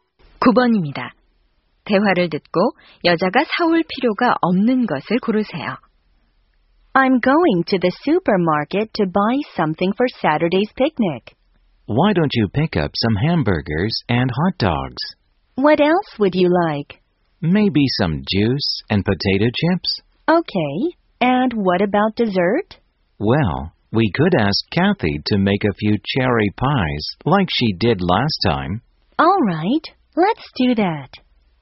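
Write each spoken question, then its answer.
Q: 대화를 듣고 여자가 사올 필요가 없는 것을 고르세요.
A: 체리 파이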